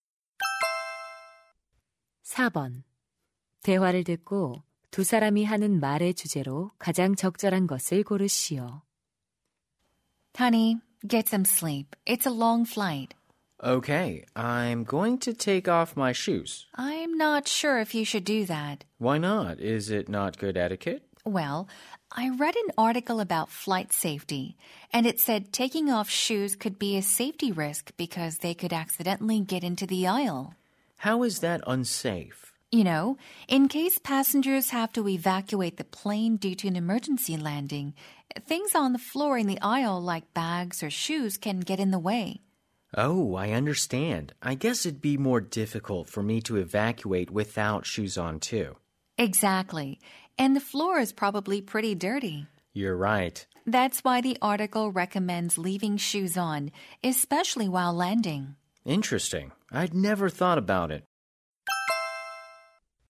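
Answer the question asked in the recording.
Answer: 비행 중 신발을 벗으면 안전에 위험한 이유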